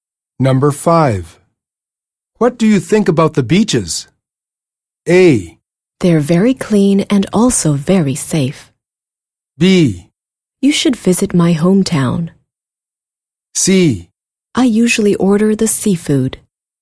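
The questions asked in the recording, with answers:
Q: What do you think about the beaches?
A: A: They're very clean and also very safe.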